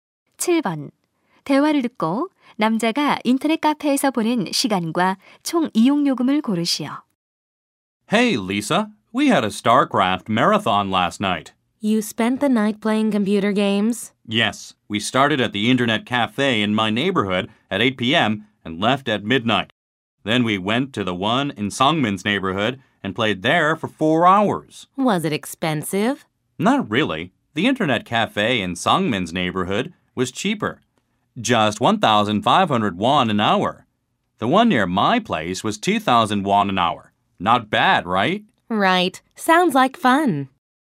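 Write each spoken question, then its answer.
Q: 대화를 듣고 남자가 인터넷 카페에서 보낸 시간과 총 이용 요금을 고르시오.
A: 8시간, 14,000원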